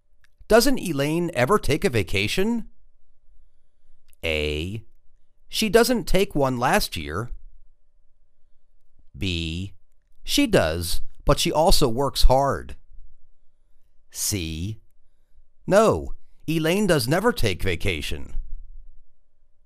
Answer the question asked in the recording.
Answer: She does, but she also works hard.